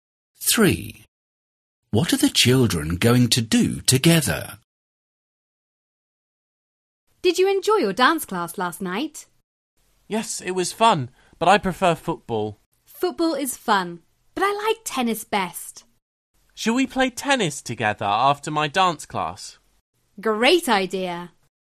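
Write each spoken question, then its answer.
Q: What are the children going to do together?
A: Play tennis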